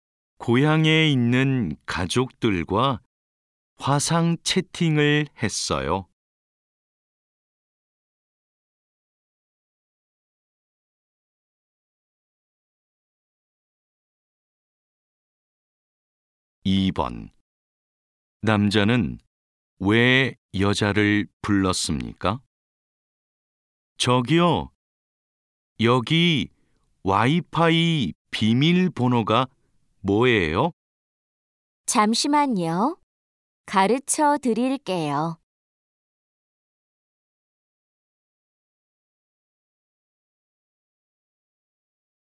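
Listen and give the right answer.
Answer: 와이파이 비밀번호를 물어보려고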